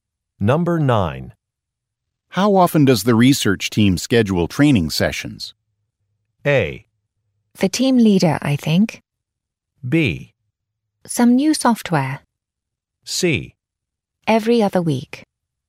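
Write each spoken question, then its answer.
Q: How often does the research team schedule training sessions?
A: C: Every other week.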